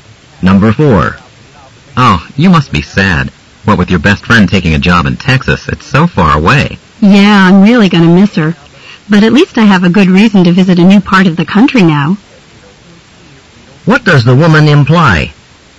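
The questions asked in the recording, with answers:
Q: What does the woman imply?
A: She is looking forward to visiting her friend in Texas.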